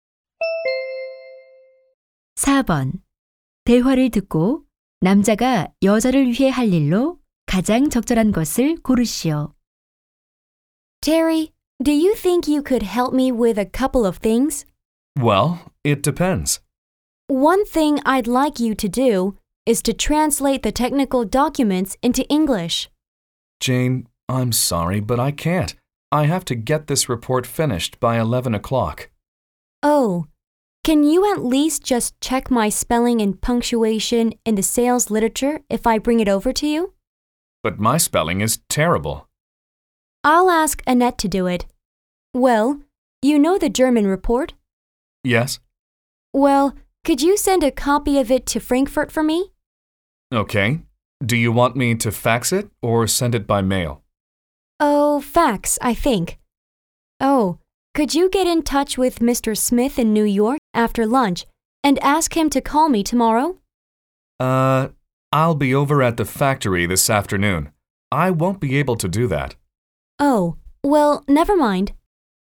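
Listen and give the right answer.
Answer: 독일 보고서 사본을 프랑크푸르트에 팩스로 보내기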